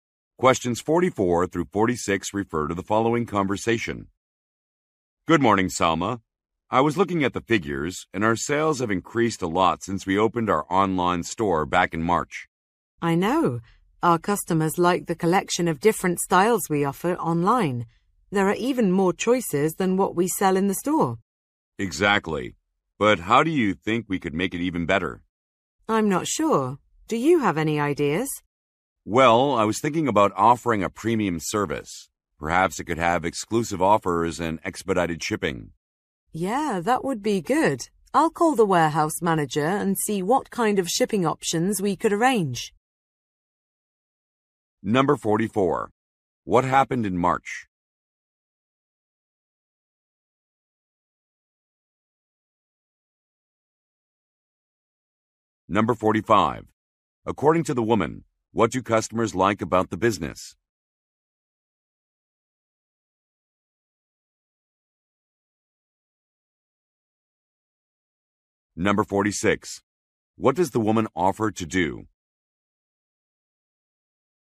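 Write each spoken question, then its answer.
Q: What happened in March?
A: An online store opened

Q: According to the woman, what do customers like about the business?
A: The variety of styles offered online

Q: What does the woman offer to do?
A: Call the warehouse manager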